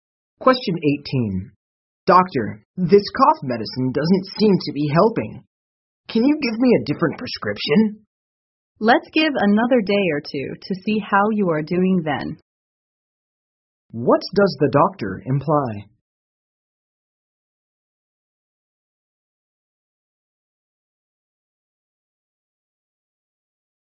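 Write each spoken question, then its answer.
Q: What does the doctor imply?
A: The man should keep taking the same medicine for another day or two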